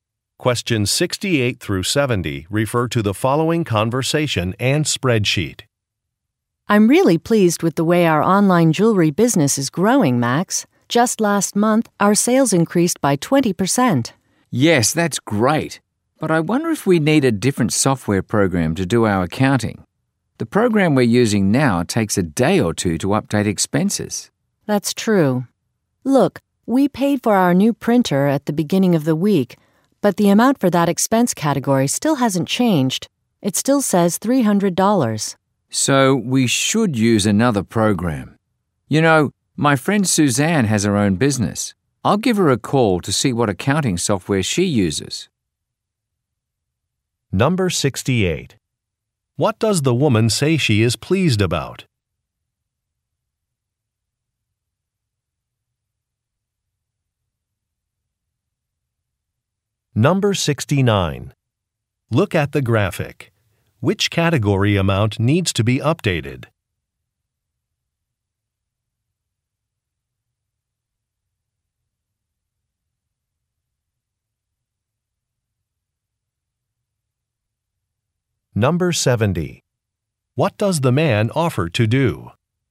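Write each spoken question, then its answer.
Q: What does the woman say she is pleased about?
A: Sales increased by 20%

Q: What does the man offer to do?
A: Call a friend about her accounting software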